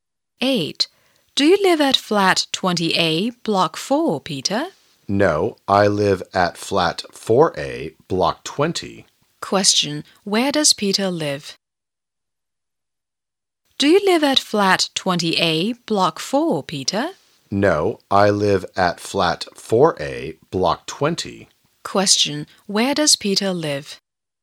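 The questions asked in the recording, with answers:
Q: Question. Where does Peter live?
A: Flat 4A, Block 20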